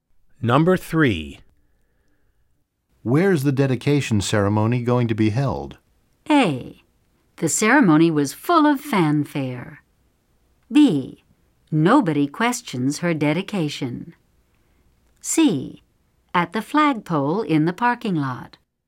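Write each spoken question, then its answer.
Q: Where's the dedication ceremony going to be held?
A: C: At the flagpole in the parking lot.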